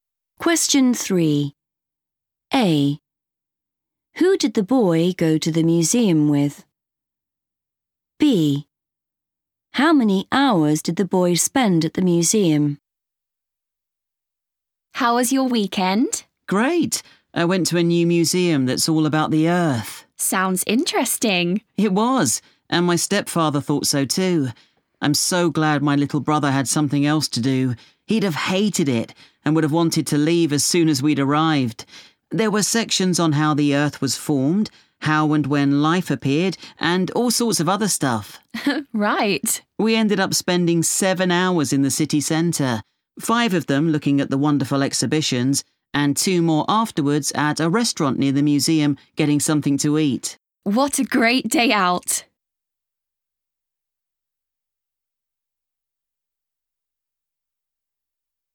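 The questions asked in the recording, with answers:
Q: Who did the boy go to the museum with?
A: his stepfather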